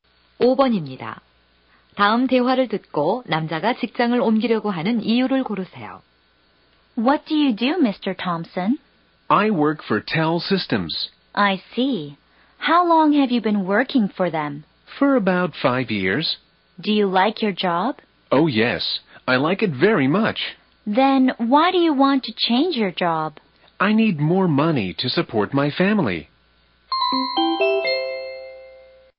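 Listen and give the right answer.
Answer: 가족을 부양하기 위해 돈이 더 필요해서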